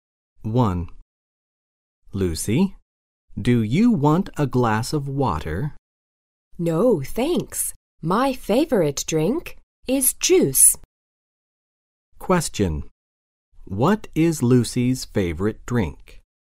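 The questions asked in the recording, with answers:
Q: What is Lucy's favorite drink?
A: Juice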